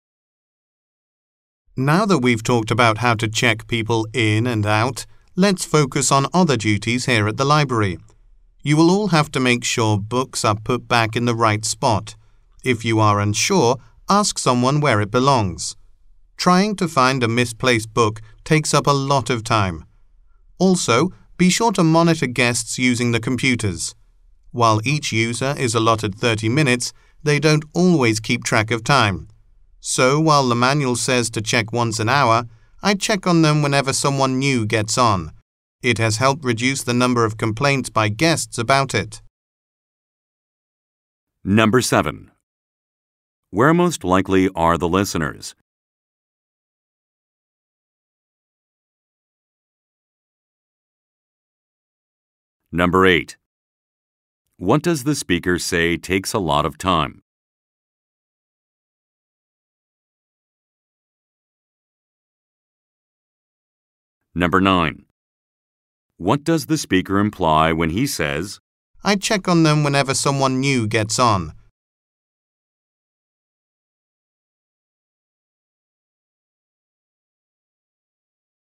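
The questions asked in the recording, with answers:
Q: Where most likely are the listeners?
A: At a library

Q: What does the speaker say takes a lot of time?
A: Finding a misplaced book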